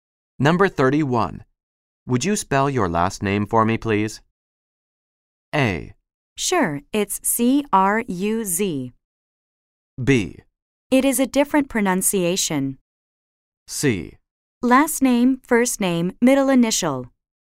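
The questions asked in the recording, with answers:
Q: Would you spell your last name for me, please?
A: A: Sure, it's C-R-U-Z.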